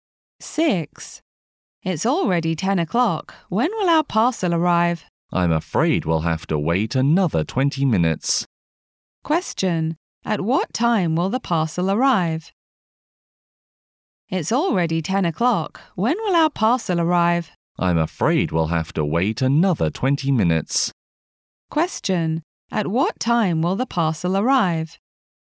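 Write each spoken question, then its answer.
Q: At what time will the parcel arrive?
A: At 10:20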